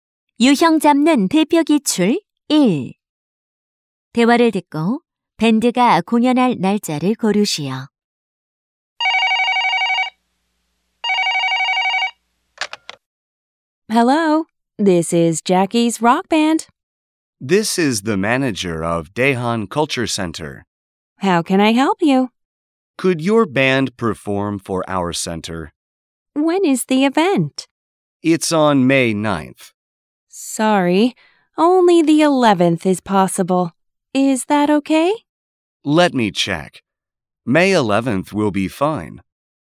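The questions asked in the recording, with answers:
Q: 대화를 듣고 밴드가 공연할 날짜를 고르시오.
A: 5월 11일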